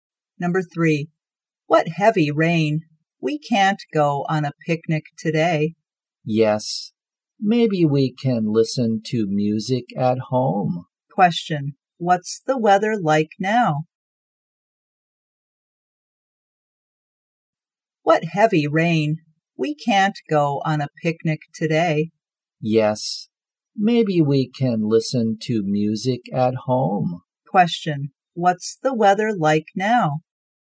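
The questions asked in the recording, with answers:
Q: what's the weather like now?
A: Rainy (heavy rain).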